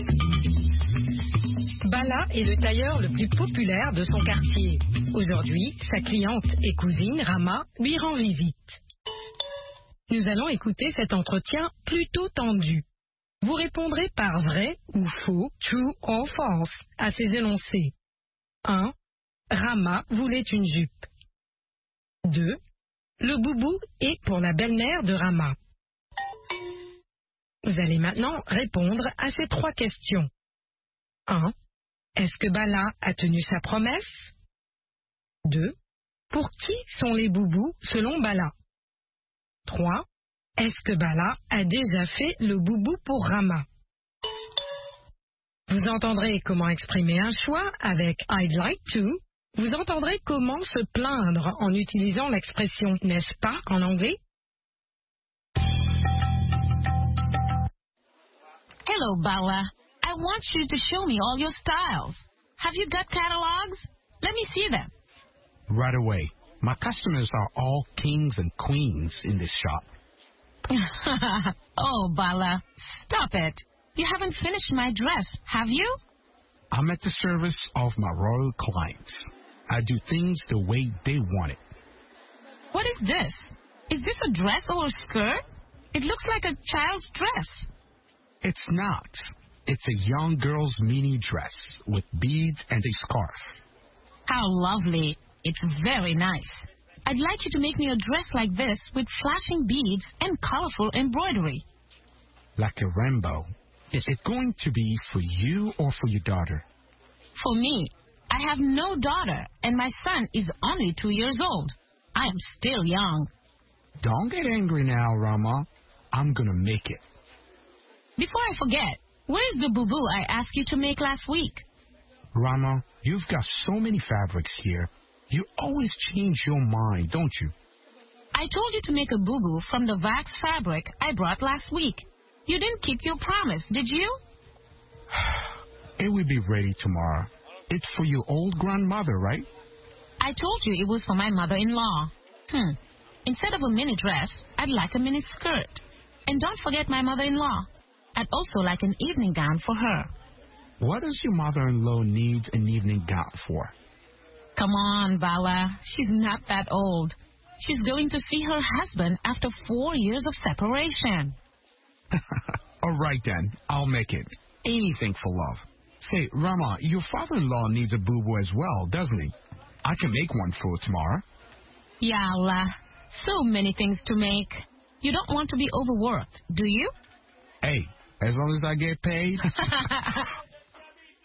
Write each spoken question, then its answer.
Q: Le boubou est pour la belle-mère de Rama.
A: L'énoncé 2 est vrai.

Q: Est-ce que Bala a tenu sa promesse?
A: Non.

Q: Pour qui sont les boubous selon Bala?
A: Pour les personnes âgées.

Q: Est-ce que Bala a déjà fait le boubou pour Rama?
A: Pas encore.